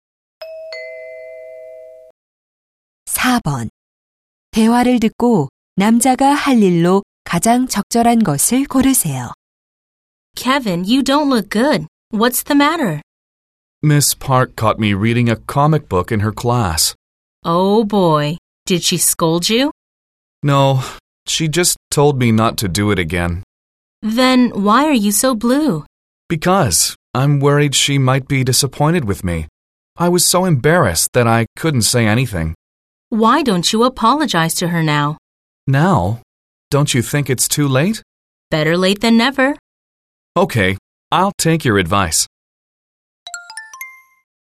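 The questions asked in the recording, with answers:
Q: 대화를 듣고 남자가 할 일로 가장 적절한 것을 고르세요.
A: 선생님께 사과하기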